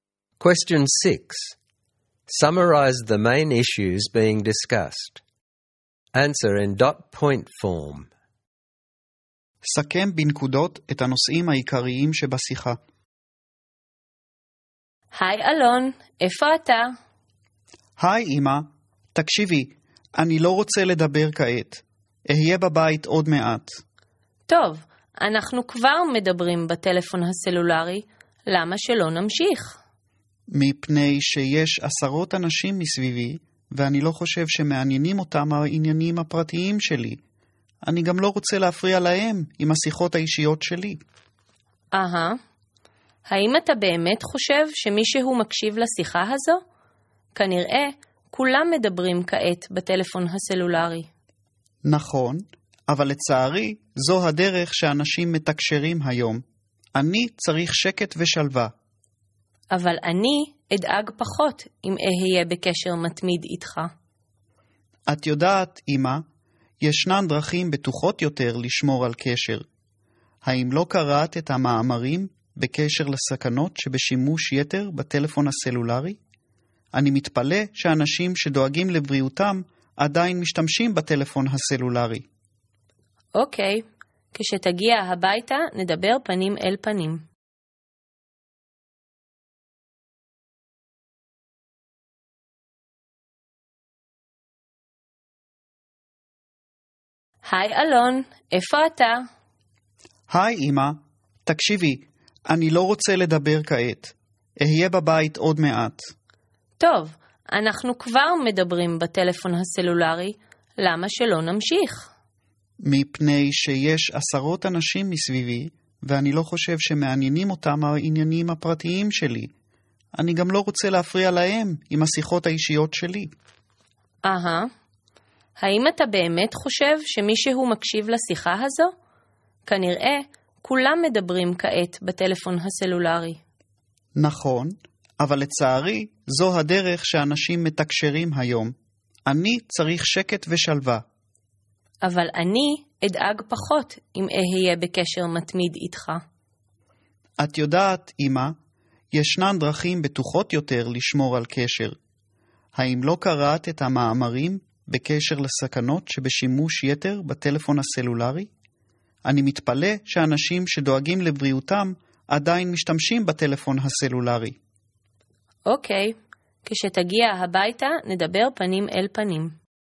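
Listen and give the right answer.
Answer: Alon does not want to talk on his mobile phone in public: it lacks privacy and disturbs others, and he needs peace and quiet. His mother wants constant contact so she will worry less. Alon also raises the health dangers of overusing mobile phones.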